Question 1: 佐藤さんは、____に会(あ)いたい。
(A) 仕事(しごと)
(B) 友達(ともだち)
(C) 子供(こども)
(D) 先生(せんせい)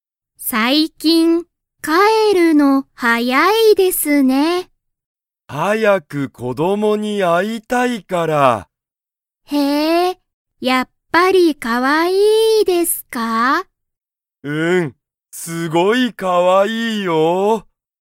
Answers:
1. 子供(こども)

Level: Level 1

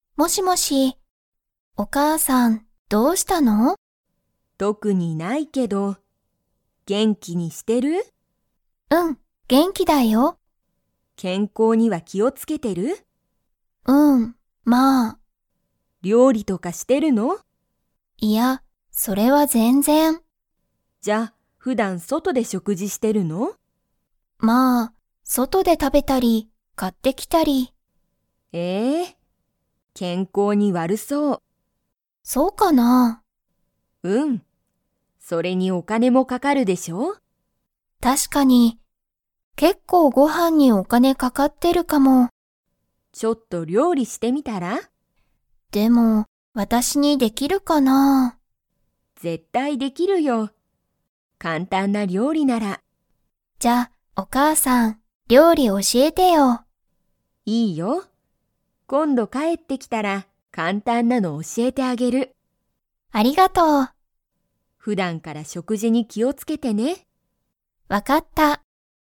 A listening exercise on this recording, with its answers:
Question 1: ミカはよく料理りょうりをしていますか?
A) はい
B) いいえ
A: いいえ

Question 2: ミカは、結構けっこうご飯はんに がかかってる。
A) 仕事しごと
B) 元気げんき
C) 普段ふだん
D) お金かね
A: お金かね

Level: Level 3

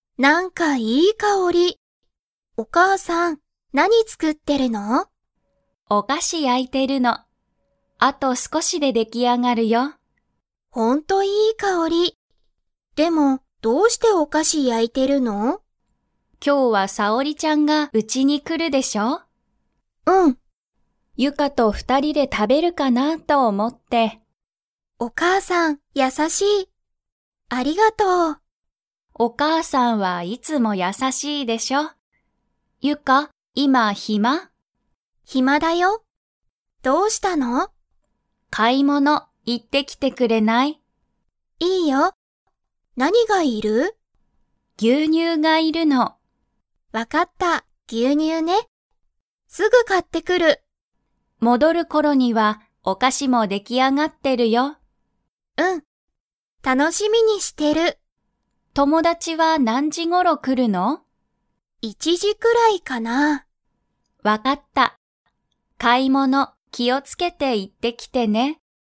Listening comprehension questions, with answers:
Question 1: ユカは今いま 。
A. 暇ひまだ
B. 暇ひまじゃない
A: 暇ひまだ

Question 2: お母かあさんは、何なにが要いりますか?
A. お菓子かし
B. 友達ともだち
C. 牛乳ぎゅうにゅう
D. 昼ひるご飯はん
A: 牛乳ぎゅうにゅう

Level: Level 4

